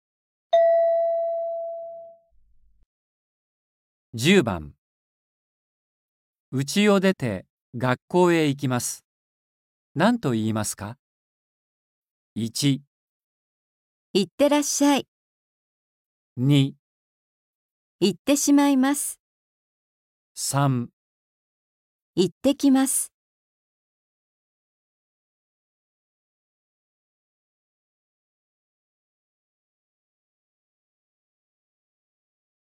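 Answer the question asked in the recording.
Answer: 3

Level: N4.35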